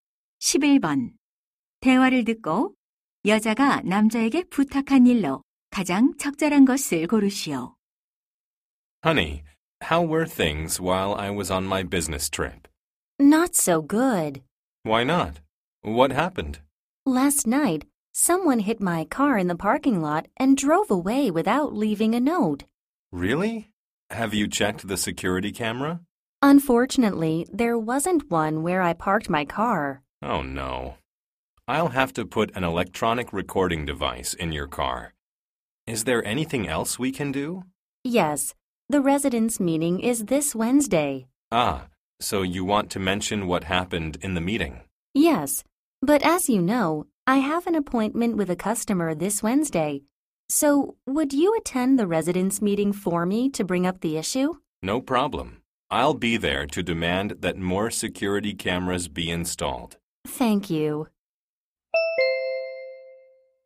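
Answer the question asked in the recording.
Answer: 자신 대신 주민 회의에 참석하기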